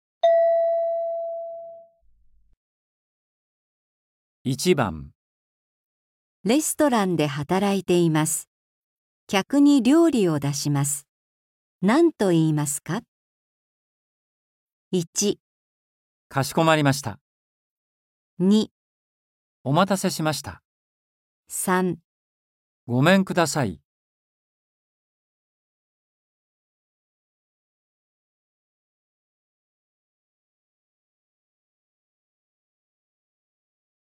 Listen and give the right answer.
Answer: 2

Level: 初級